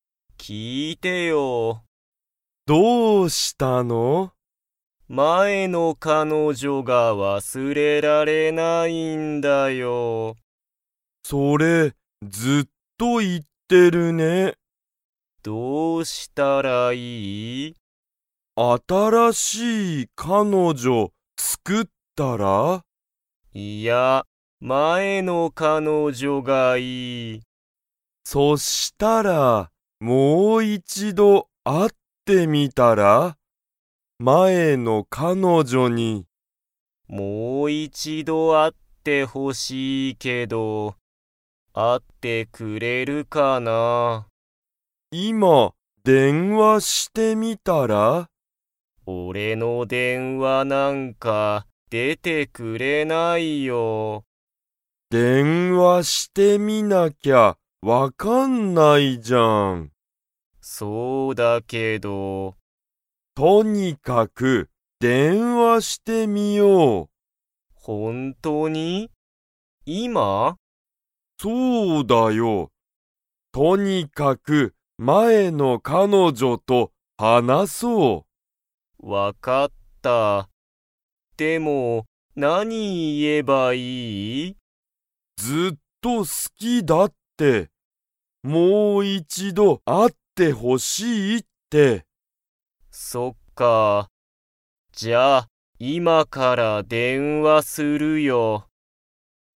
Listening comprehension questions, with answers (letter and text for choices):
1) つよしは____彼女(かのじょ)が忘(わす)れられない。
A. 新(あたら)しい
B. 次(つぎ)の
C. もう一度(いちど)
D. 前(まえ)の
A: D. 前(まえ)の

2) つよしは、今(いま)から電話(でんわ)しますか?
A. はい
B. いいえ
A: A. はい

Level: Level 2